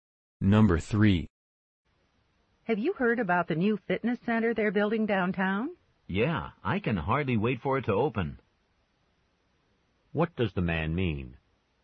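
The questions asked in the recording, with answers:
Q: What does the man mean?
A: He is eager for the fitness center to open.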